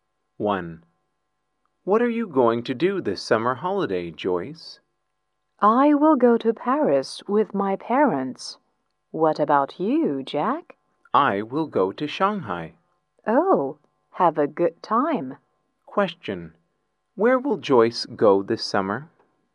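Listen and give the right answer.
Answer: Paris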